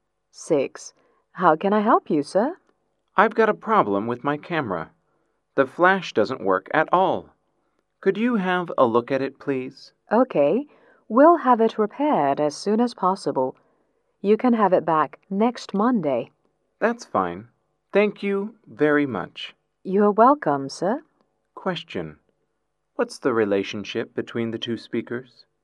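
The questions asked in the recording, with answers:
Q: What's the relationship between the two speakers?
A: Repairman and customer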